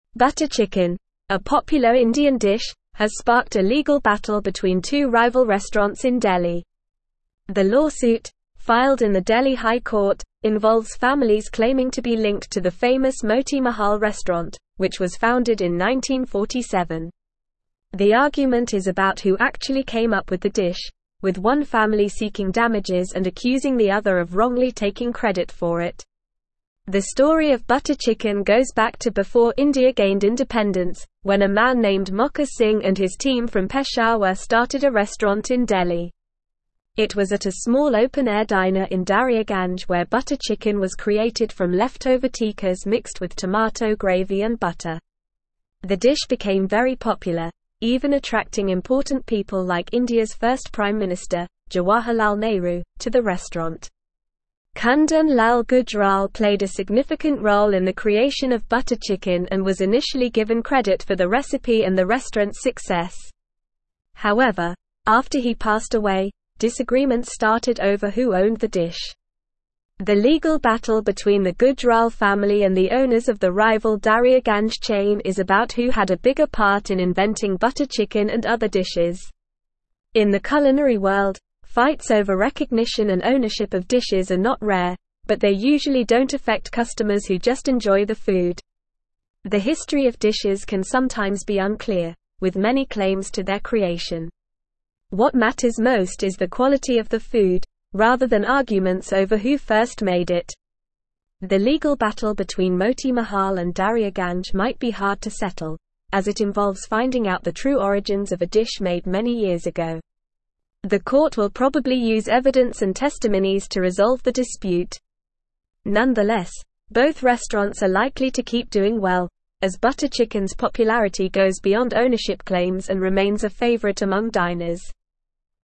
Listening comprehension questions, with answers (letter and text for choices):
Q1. Butter chicken, a popular Indian dish, has sparked a legal (1)______ between two rival restaurants in Delhi.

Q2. The lawsuit, filed in the Delhi High (2)______, (3)______ families claiming to be linked to the (4)______ Moti Mahal restaurant, which was founded in 1947.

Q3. The lawsuit, filed in the Delhi High (2)______, (3)______ families claiming to be linked to the (4)______ Moti Mahal restaurant, which was founded in 1947.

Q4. The lawsuit, filed in the Delhi High (2)______, (3)______ families claiming to be linked to the (4)______ Moti Mahal restaurant, which was founded in 1947.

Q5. The story of butter chicken goes back to before India gained independence, when a man named (5)______ Singh and his team from Peshawar started a restaurant in Delhi.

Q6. It was at a small open-air diner in Daryaganj where butter (6)______ was created from leftover tikkas (7)______ with tomato gravy and butter.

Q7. It was at a small open-air diner in Daryaganj where butter (6)______ was created from leftover tikkas (7)______ with tomato gravy and butter.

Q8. Kundan Lal (8)______ played a significant role in the creation of butter chicken and was initially given credit for the recipe and the restaurant's success.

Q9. However, after he passed away, disagreements (9)______ over who owned the dish.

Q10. The legal battle between the Gujral family and the owners of the rival (10)______ chain is about who had a bigger part in inventing butter chicken and (11)______ dishes.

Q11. The legal battle between the Gujral family and the owners of the rival (10)______ chain is about who had a bigger part in inventing butter chicken and (11)______ dishes.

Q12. The history of dishes can sometimes be (12)______, with many claims to their creation.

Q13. What (13)______ most is the quality of the food, rather than arguments over who first made it.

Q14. Nonetheless, both (14)______ are likely to keep doing well, as butter chicken's popularity goes beyond ownership claims and (15)______ a (16)______ among diners.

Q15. Nonetheless, both (14)______ are likely to keep doing well, as butter chicken's popularity goes beyond ownership claims and (15)______ a (16)______ among diners.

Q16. Nonetheless, both (14)______ are likely to keep doing well, as butter chicken's popularity goes beyond ownership claims and (15)______ a (16)______ among diners.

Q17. What sparked the legal battle between two rival restaurants in Delhi?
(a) Butter chicken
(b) Naan bread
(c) Samosas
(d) Mango lassi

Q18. When was the famous Moti Mahal restaurant founded?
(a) 1955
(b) 1963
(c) 1947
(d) 1971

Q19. Where was butter chicken created?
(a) Peshawar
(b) Daryaganj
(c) Mumbai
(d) Kolkata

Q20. Who is involved in the legal battle over the ownership of butter chicken?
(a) Gujral family and Daryaganj owners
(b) Nehru family and Moti Mahal owners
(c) Singh family and Peshawar owners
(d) Mahal family and Mumbai owners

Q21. What is the main focus in the culinary world according to the article?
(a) Ownership of dishes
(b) Restaurant popularity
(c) Price of the dishes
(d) Quality of the food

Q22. What might the court use to resolve the legal dispute between the restaurants?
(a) Social media polls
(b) Evidence and testimonies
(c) Coin toss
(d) Magic eight ball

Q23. What is the main reason why both restaurants are likely to continue doing well despite the legal battle?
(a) Ownership claims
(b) Price of the dishes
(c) Butter chicken's popularity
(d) Restaurant location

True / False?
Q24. The court will likely use evidence and testimonies to settle the legal battle between Moti Mahal and Daryaganj.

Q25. Kundan Lal Gujral was initially credited with the recipe and restaurant's success.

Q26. The dish was created from leftover tikkas mixed with tomato gravy and butter at a small open-air diner.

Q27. Two food stalls in Delhi are competing in court over who truly invented butter chicken.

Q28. Butter chicken was invented before India gained independence by Mokha Singh and his team.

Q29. What is the legal battle in Delhi High Court about?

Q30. When was the Moti Mahal restaurant founded?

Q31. How was butter chicken created?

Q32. Who was initially given credit for the recipe and the restaurant's success?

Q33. Why did disagreements start over who owned the dish?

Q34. Why don't fights over recognition and ownership of dishes usually affect customers?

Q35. What is the court likely to use to resolve the dispute?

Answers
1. battle
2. Court
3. involves
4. famous
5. Mokha
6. chicken
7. mixed
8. Gujral
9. started
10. Daryaganj
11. other
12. unclear
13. matters
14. restaurants
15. remains
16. favorite
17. (a) Butter chicken
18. (c) 1947
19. (b) Daryaganj
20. (a) Gujral family and Daryaganj owners
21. (d) Quality of the food
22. (b) Evidence and testimonies
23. (c) Butter chicken's popularity
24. True
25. True
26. True
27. False
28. True
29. The legal battle in the Delhi High Court is about who actually came up with the dish butter chicken.
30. The Moti Mahal restaurant was founded in 1947.
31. Butter chicken was created from leftover tikkas mixed with tomato gravy and butter.
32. Kundan Lal Gujral was initially given credit for the recipe and the restaurant's success.
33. Disagreements started over who owned the dish because after Kundan Lal Gujral passed away, there were disputes over who had a bigger part in inventing butter chicken and other dishes.
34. Fights over recognition and ownership of dishes usually don't affect customers because what matters most to them is the quality of the food, rather than arguments over who first made it.
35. The court is likely to use evidence and testimonies to resolve the dispute.

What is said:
Butter chicken, a popular Indian dish, has sparked a legal battle between two rival restaurants in Delhi. The lawsuit, filed in the Delhi High Court, involves families claiming to be linked to the famous Moti Mahal restaurant, which was founded in 1947. The argument is about who actually came up with the dish, with one family seeking damages and accusing the other of wrongly taking credit for it.
The story of butter chicken goes back to before India gained independence, when a man named Mokha Singh and his team from Peshawar started a restaurant in Delhi. It was at a small open-air diner in Daryaganj where butter chicken was created from leftover tikkas mixed with tomato gravy and butter. The dish became very popular, even attracting important people like India's first prime minister, Jawaharlal Nehru, to the restaurant.
Kundan Lal Gujral played a significant role in the creation of butter chicken and was initially given credit for the recipe and the restaurant's success. However, after he passed away, disagreements started over who owned the dish. The legal battle between the Gujral family and the owners of the rival Daryaganj chain is about who had a bigger part in inventing butter chicken and other dishes.
In the culinary world, fights over recognition and ownership of dishes are not rare, but they usually don't affect customers who just enjoy the food. The history of dishes can sometimes be unclear, with many claims to their creation. What matters most is the quality of the food, rather than arguments over who first made it. The legal battle between Moti Mahal and Daryaganj might be hard to settle, as it involves finding out the true origins of a dish made many years ago. The court will probably use evidence and testimonies to resolve the dispute. Nonetheless, both restaurants are likely to keep doing well, as butter chicken's popularity goes beyond ownership claims and remains a favorite among diners.

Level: Level 3